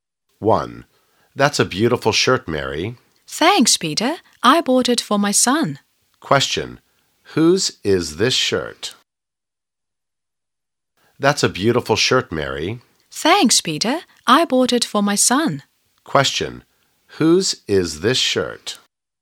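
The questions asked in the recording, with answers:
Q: Whose is this shirt?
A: Mary's son's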